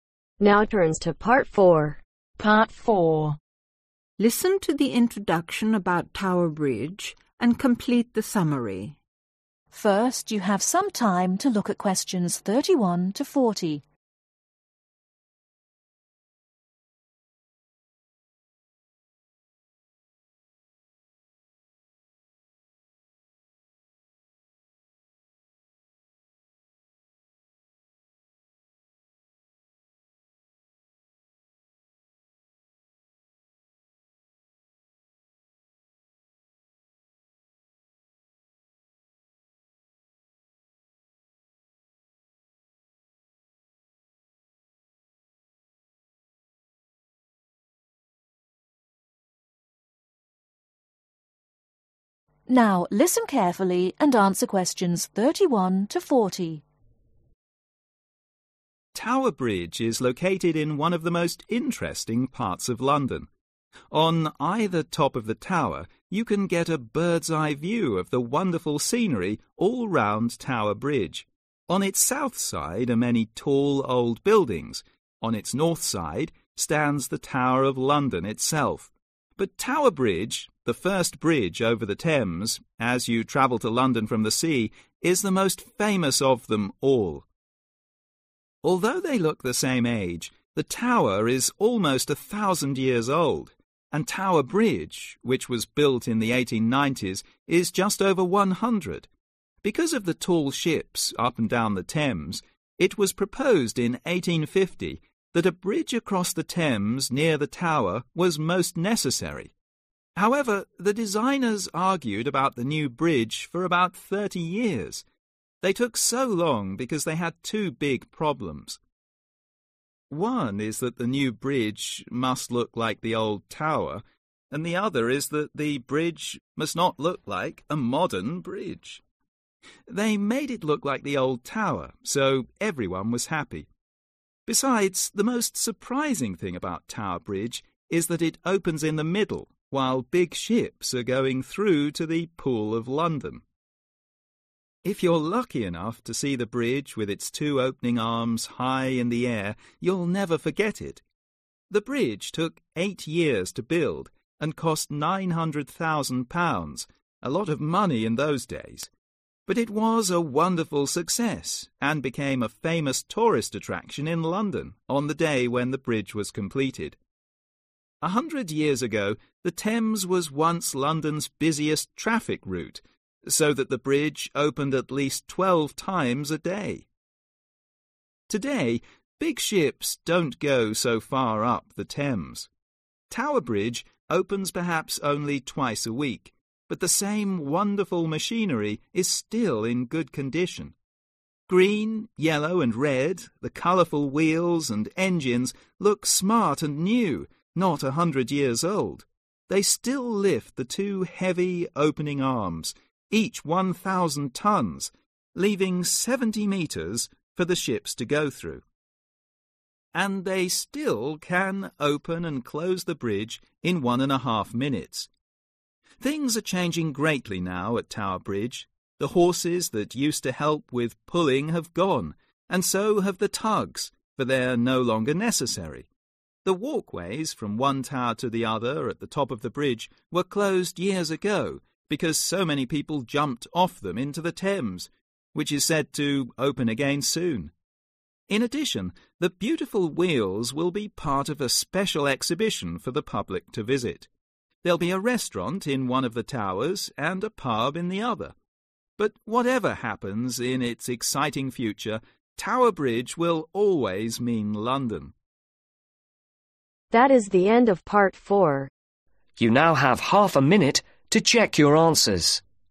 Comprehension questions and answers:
Complete the notes below. Write ONE WORD OR A NUMBER for each answer.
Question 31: Tower Bridge , the first bridge over the (31)............ ,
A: Thames

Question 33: The original designers wanted to make it look like the Tower of London not a modern (33)............ .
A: Bridge

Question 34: Compared with the Tower , which has almost a (34)............ year history.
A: Thousand

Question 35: Many workers spent (35)............ years in building this wonderful bridge ,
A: 8 / eight

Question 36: One special feature about this bridge is that it can (36)............ in the middle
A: Open

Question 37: while the big ships are (37)............ through to the (38)............ of London.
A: Going

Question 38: while the big ships are (37)............ through to the (38)............ of London.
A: Pool

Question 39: Today , it has become a famous tourist (39)............ .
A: Attraction

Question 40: I bet you will never forget the scene if you see the bridge with its two opening (40)............ high in the air.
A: Arms